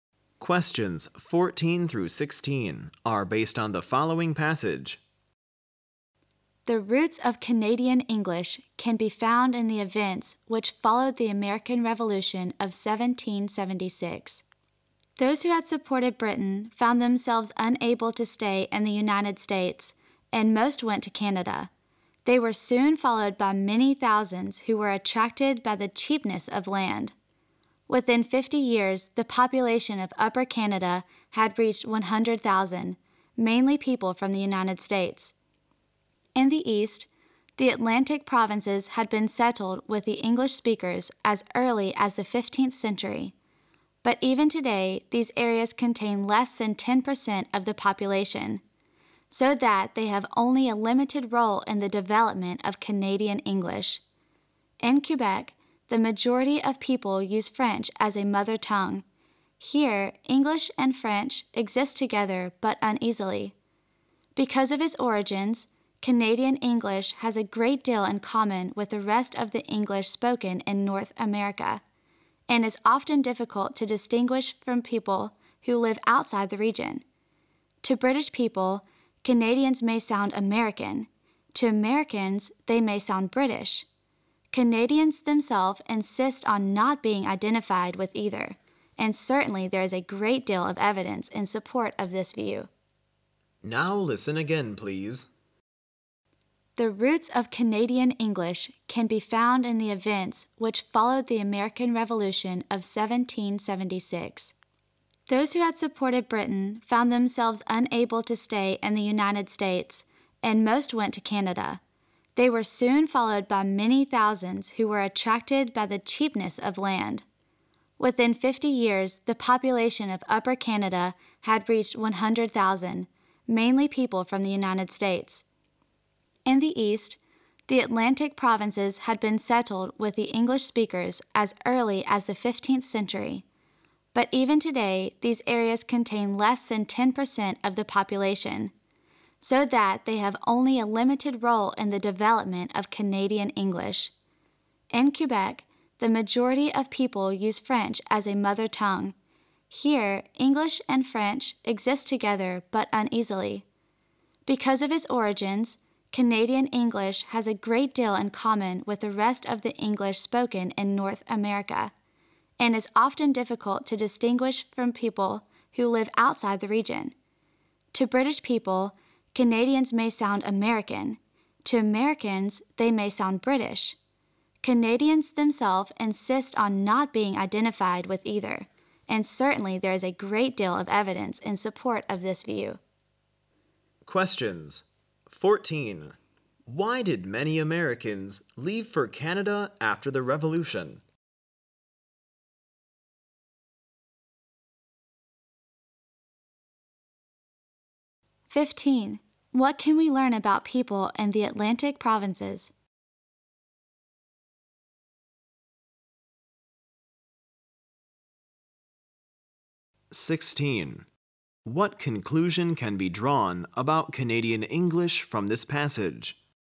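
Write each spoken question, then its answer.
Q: Why did many Americans leave for Canada after the Revolution?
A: They had supported Britain, and land in Canada was cheap

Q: What can we learn about people in the Atlantic provinces?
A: They make up less than 10% of the population and had only a limited role in Canadian English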